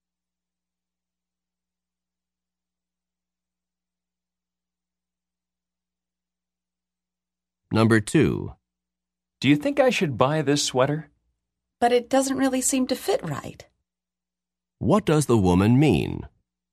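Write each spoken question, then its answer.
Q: What does the woman mean?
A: The sweater doesn't fit well, so she shouldn't buy it.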